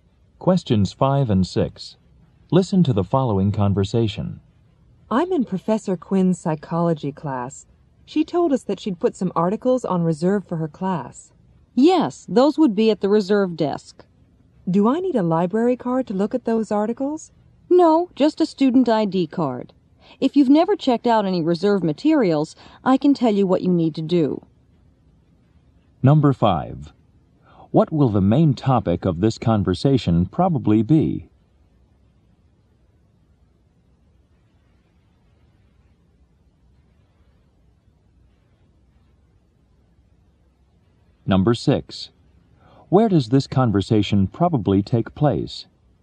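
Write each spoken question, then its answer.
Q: What will the main topic of this conversation probably be?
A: How to check out reserve materials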